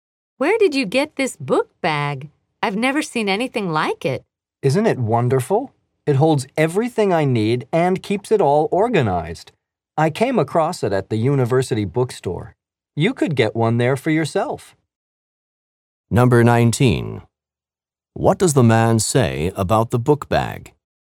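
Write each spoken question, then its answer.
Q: What does the man say about the book bag?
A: He found it at the university bookstore, and she could buy one there.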